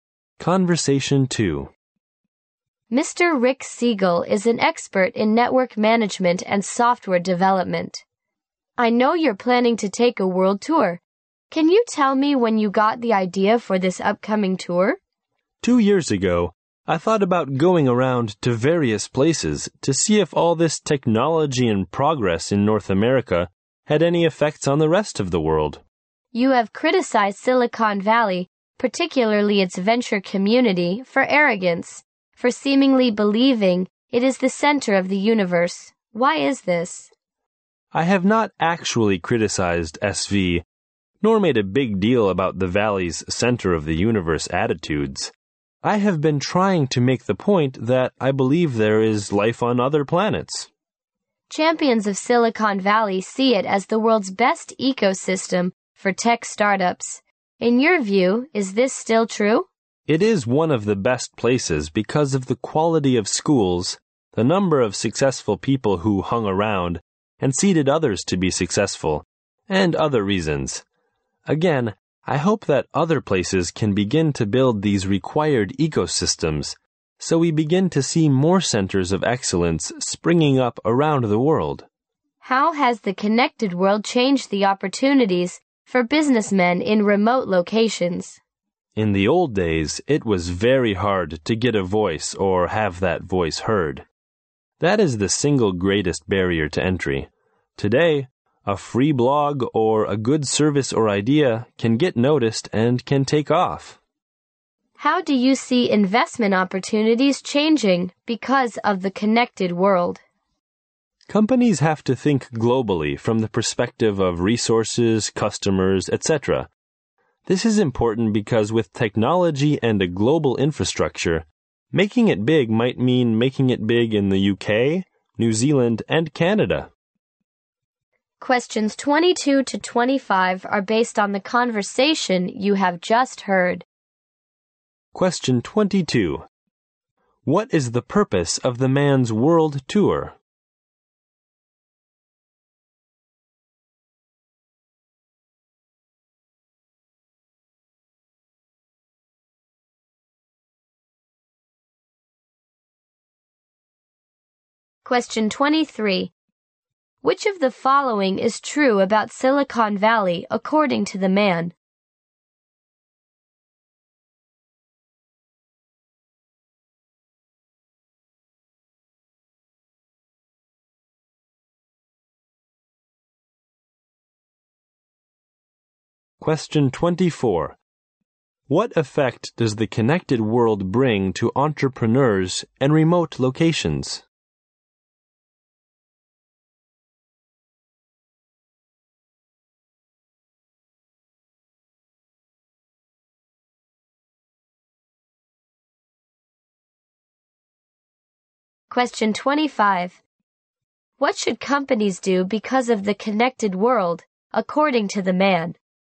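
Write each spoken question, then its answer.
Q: What is the purpose of the man's world tour?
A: To see whether North American technology and progress have affected the rest of the world.

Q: Which of the following is true about Silicon Valley according to the man?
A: It is still one of the best places for tech startups.

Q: What effect does the connected world bring to entrepreneurs in remote locations?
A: It is easier for them to be heard and get noticed.

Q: What should companies do because of the connected world, according to the man?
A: Think globally.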